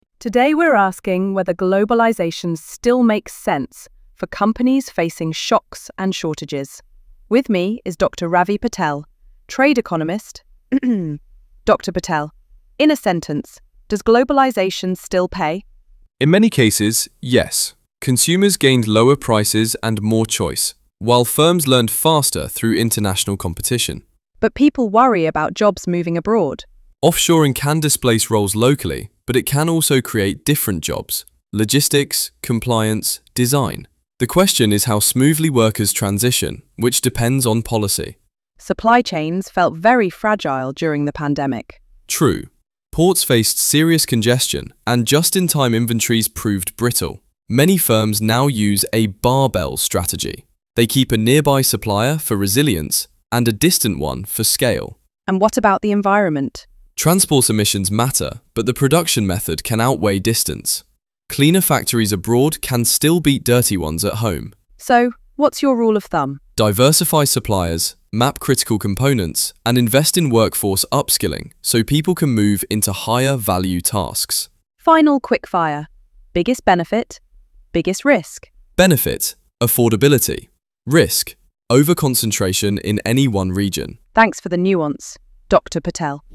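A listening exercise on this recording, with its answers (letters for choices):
Q1–Q3 Multiple choice (one answer A–D).Q4–Q6 Note completion — ONE WORD ONLY.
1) The interview mainly presents globalisation as...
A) balanced trade-off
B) mainly harmful to workers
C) an environmental solution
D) irrelevant to consumers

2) According to Dr. Patel, the most direct benefit to consumers has been...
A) faster delivery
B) lower prices and choice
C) safer products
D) guaranteed domestic jobs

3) The "barbell strategy" means firms...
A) rely on one very large supplier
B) keep one local and one distant supplier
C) split orders randomly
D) replace foreign with domestic suppliers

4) During the pandemic, ports suffered severe .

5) Firms should map their most components.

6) A key risk mentioned is over- in one region.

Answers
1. A
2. B
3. B
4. congestion
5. critical
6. concentration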